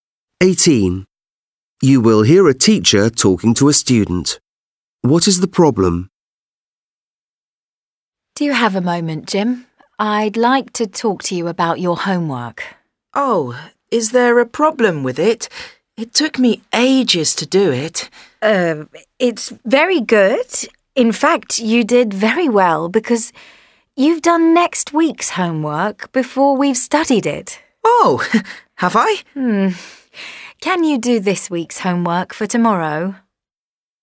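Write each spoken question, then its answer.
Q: What is the problem?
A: Jim did next week's homework instead of this week's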